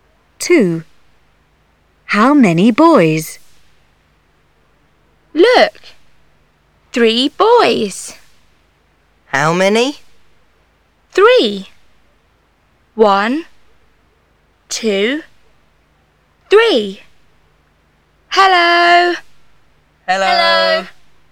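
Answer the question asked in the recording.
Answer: Three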